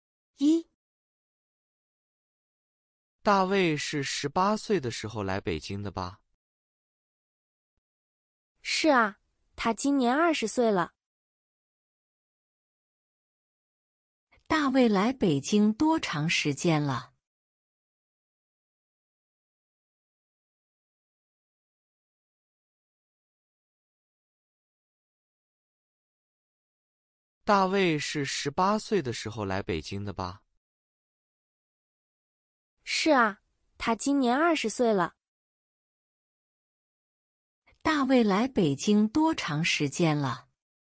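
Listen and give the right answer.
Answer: 两年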